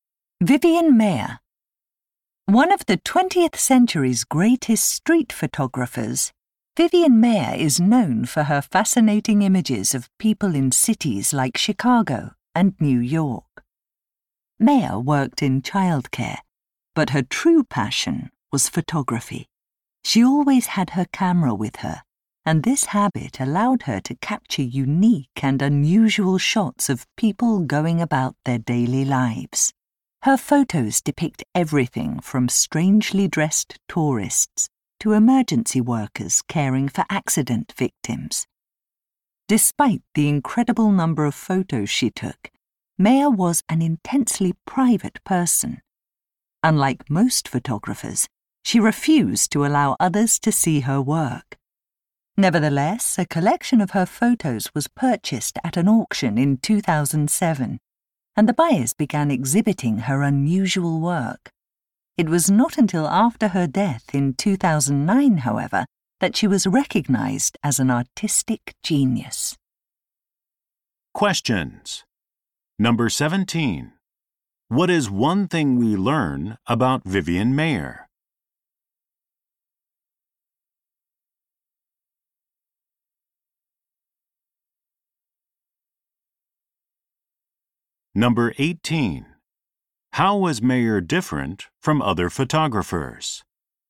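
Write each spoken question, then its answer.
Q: How was Mayer different from other photographers?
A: She refused to let others see her work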